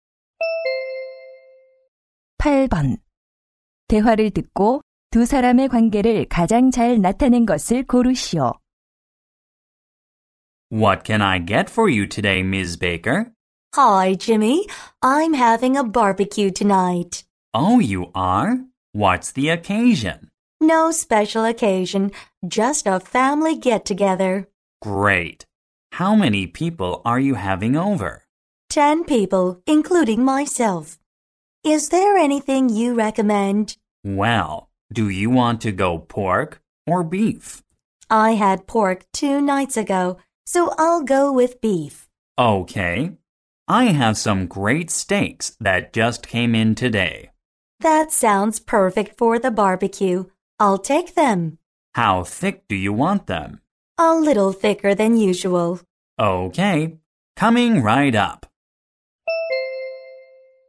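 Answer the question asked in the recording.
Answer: 고객과 정육점 주인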